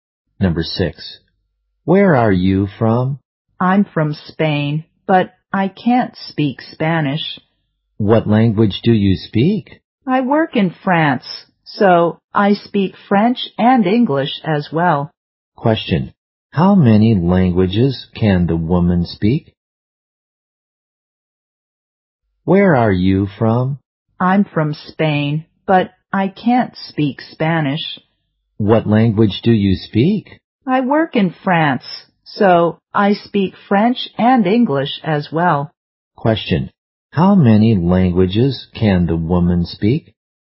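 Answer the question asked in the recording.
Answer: Two (French and English)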